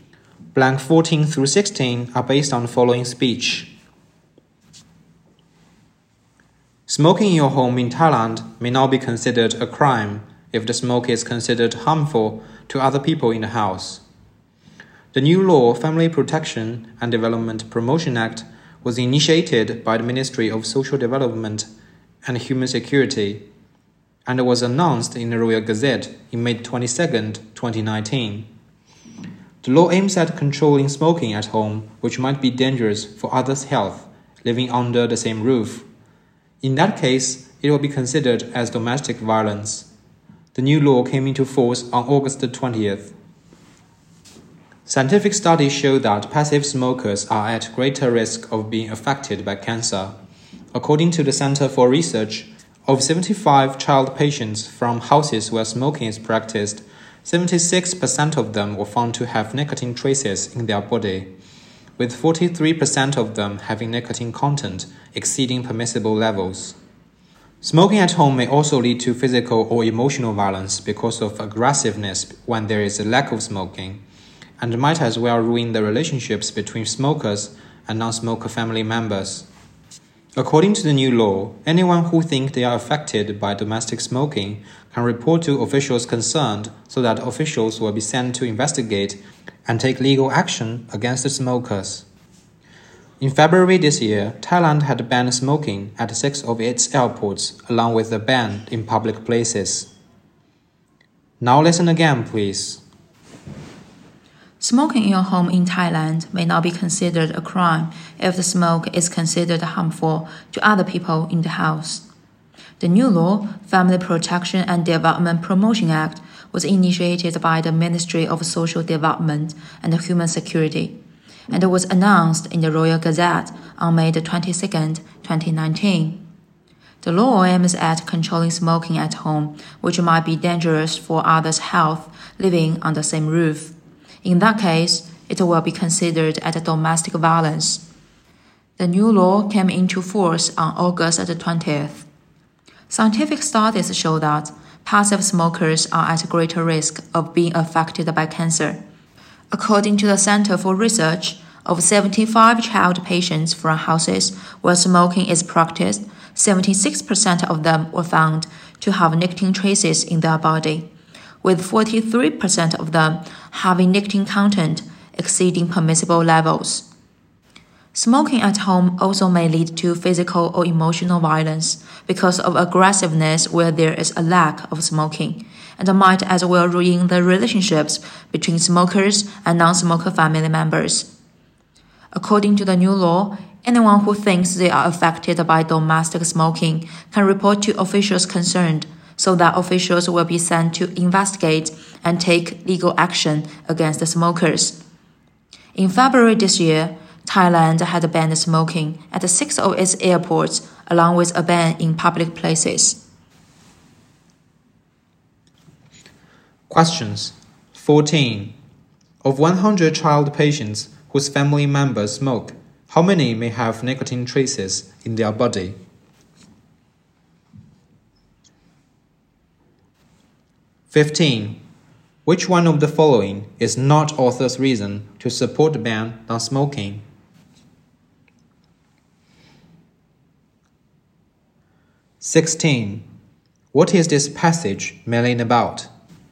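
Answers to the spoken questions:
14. About 76
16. Thailand's new law against smoking at home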